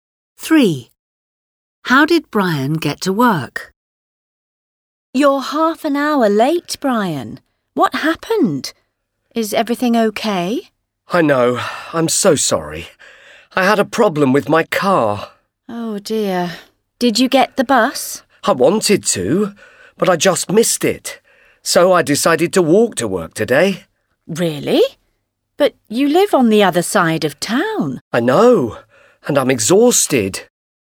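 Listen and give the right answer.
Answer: He walked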